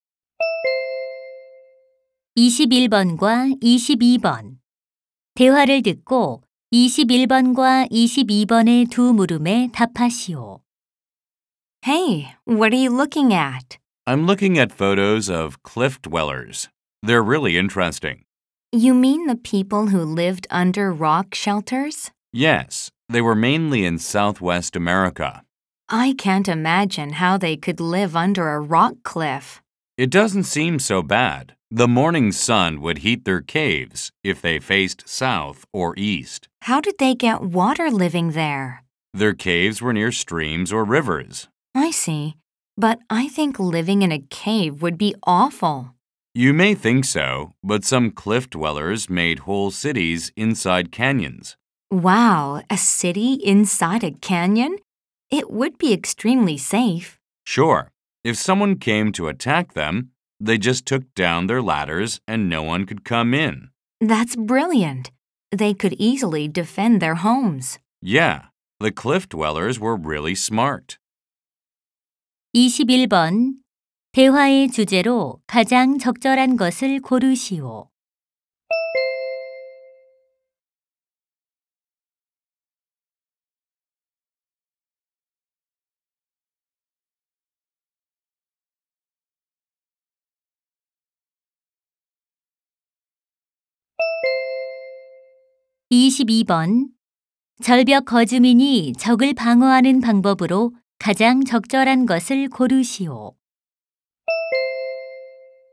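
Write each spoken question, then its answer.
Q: 대화의 주제로 가장 적절한 것을 고르시오.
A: 절벽 거주민의 생활 방식

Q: 절벽 거주민이 적을 방어하는 방법으로 가장 적절한 것을 고르시오.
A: 사다리를 치우기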